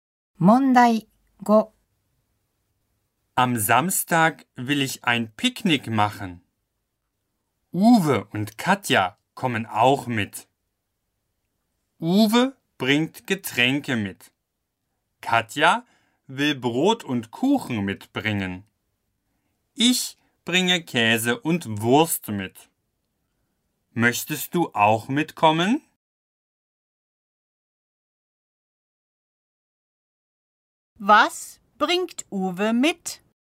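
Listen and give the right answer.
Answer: Getränke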